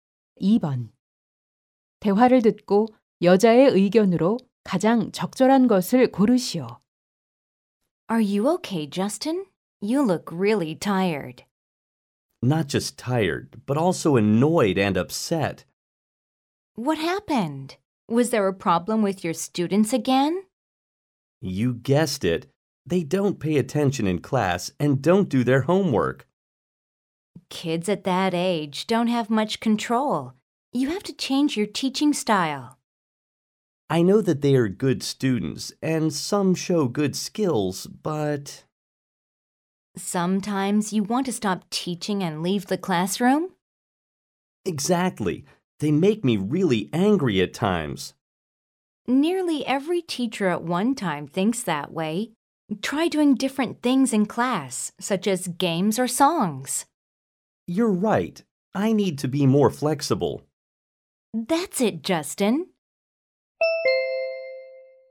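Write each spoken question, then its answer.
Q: 대화를 듣고 여자의 의견으로 가장 적절한 것을 고르시오.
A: 게임이나 노래 등을 활용해 수업 방식을 유연하게 바꿔야 한다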